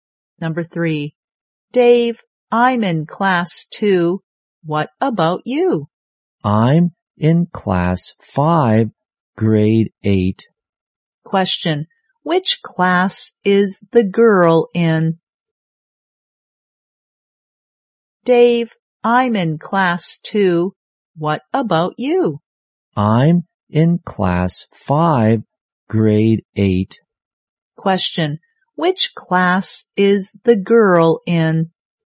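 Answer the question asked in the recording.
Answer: Class Two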